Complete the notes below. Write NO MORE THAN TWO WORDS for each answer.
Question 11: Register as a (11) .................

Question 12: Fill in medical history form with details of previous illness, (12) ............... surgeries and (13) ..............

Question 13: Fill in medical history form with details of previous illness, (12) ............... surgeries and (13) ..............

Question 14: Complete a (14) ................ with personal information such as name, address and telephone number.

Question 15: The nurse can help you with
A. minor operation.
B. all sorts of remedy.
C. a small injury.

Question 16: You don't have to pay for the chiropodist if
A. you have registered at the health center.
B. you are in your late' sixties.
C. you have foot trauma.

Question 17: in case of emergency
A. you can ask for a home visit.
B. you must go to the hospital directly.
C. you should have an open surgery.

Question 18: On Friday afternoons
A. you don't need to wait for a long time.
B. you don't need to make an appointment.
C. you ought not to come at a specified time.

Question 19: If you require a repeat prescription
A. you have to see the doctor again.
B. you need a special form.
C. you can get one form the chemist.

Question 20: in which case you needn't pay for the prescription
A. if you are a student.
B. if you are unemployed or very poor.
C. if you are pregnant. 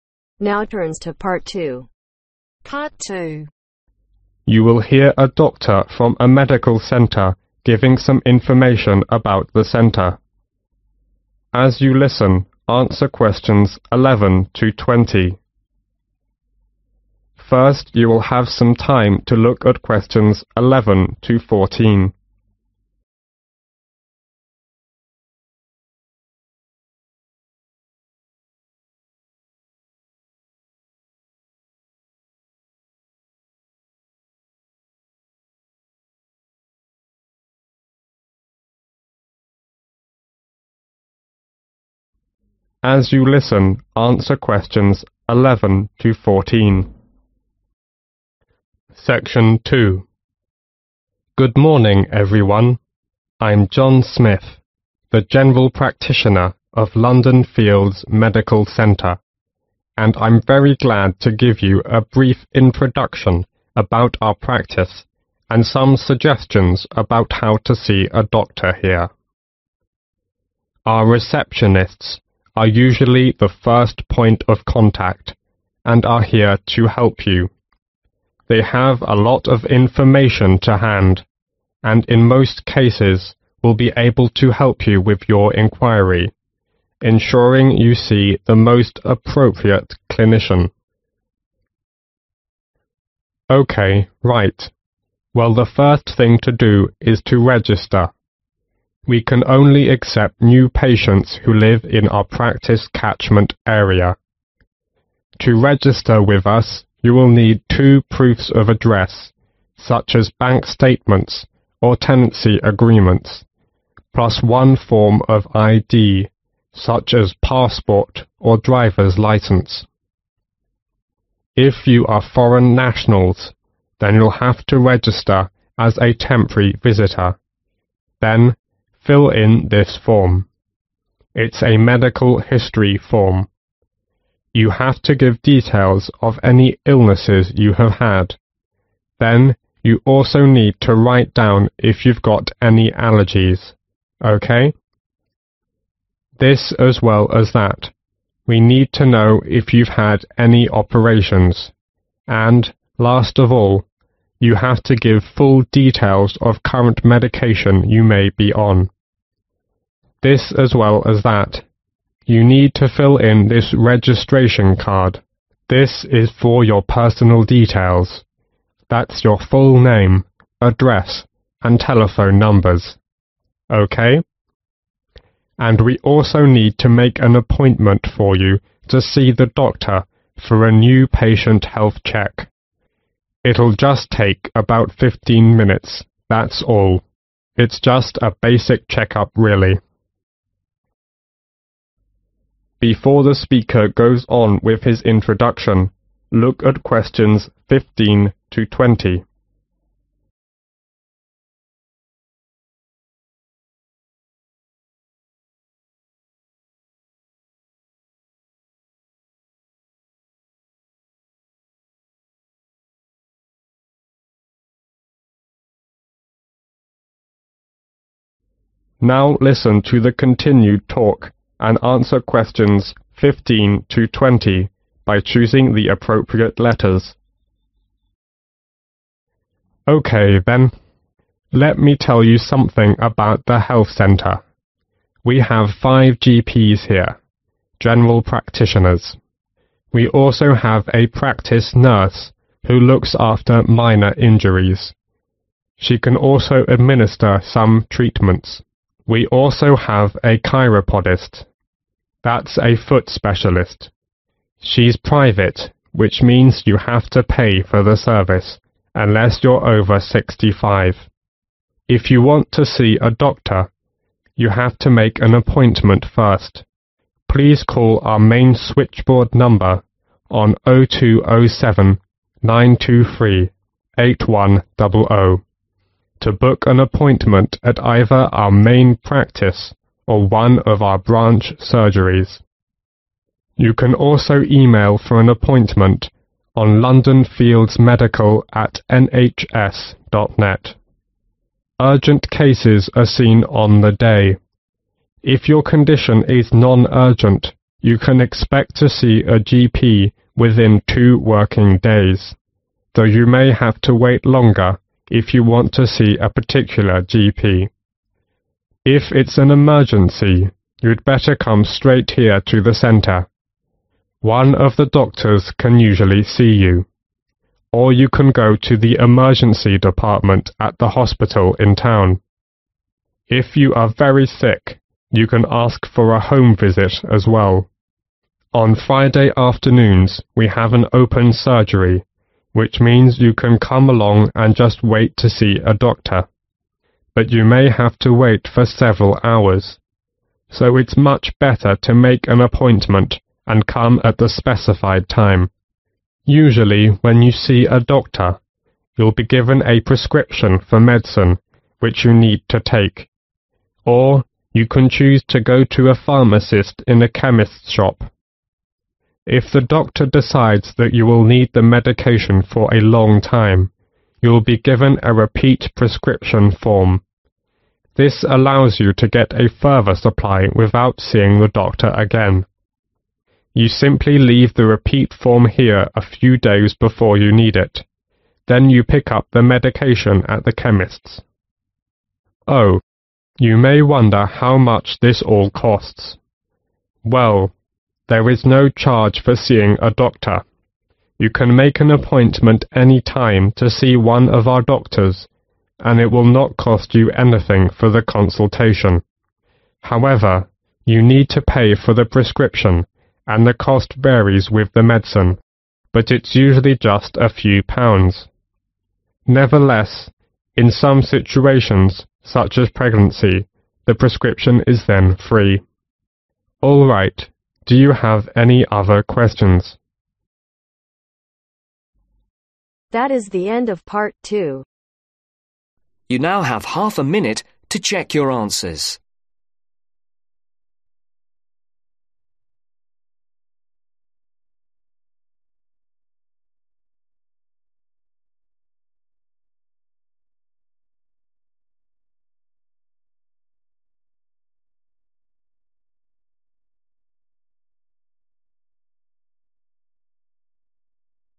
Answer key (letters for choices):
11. temporary visitor
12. allergies
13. current medication
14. registration card
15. C
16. B
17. A
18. B
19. B
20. C